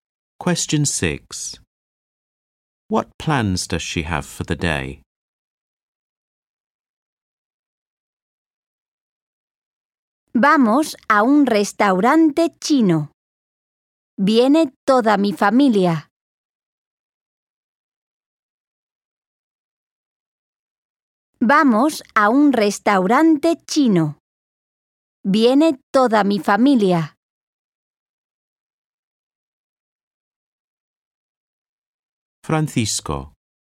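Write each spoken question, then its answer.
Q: What plans does she have for the day?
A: Going to a Chinese restaurant with her whole family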